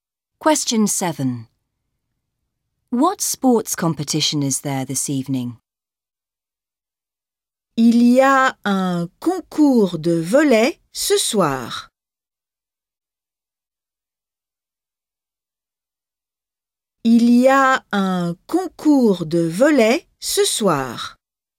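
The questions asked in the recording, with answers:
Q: What sports competition is there this evening?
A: Volleyball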